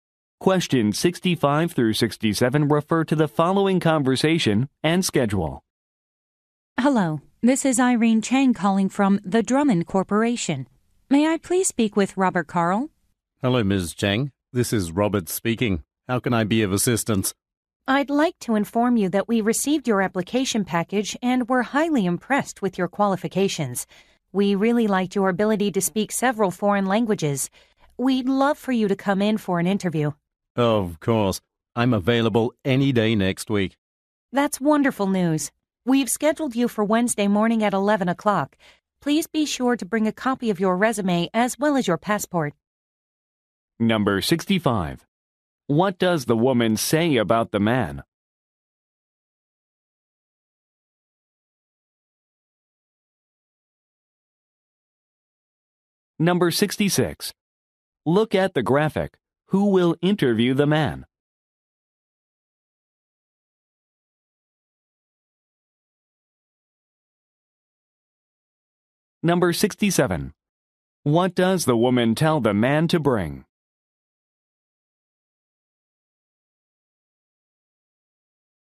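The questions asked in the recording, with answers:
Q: What does the woman say about the man?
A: He can speak several foreign languages

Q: What does the woman tell the man to bring?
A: A copy of his resume and his passport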